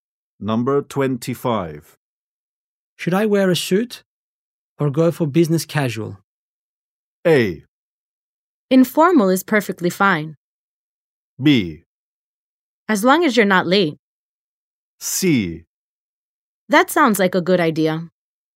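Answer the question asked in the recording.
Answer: A: Informal is perfectly fine.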